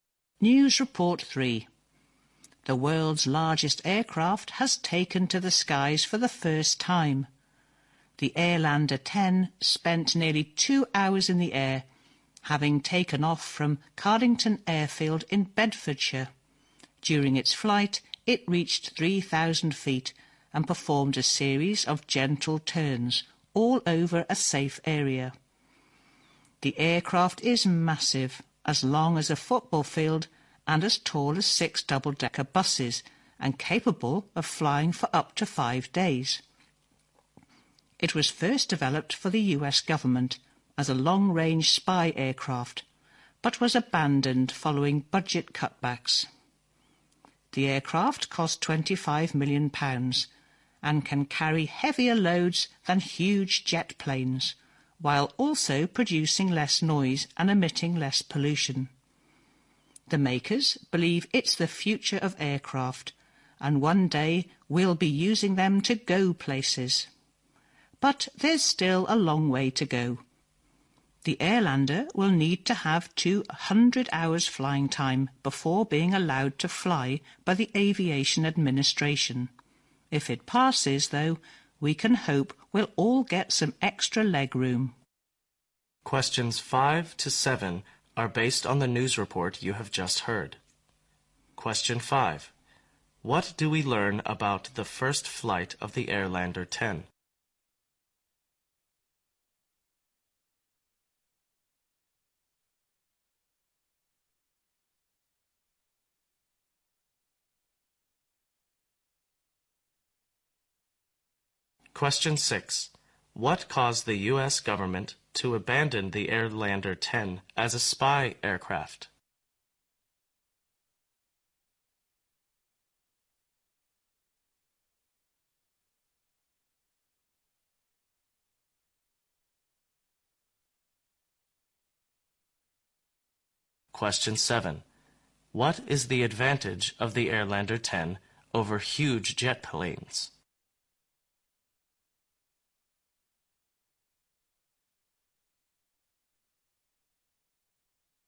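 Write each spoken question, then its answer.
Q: What do we learn about the first flight of the Airlander 10?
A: It stayed in the air for nearly 2 hours and reached 3,000 feet.

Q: What caused the U.S.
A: Budget cutbacks.

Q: What is the advantage of the Airlander 10 over huge jet planes?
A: It can carry heavier loads with less noise and less pollution.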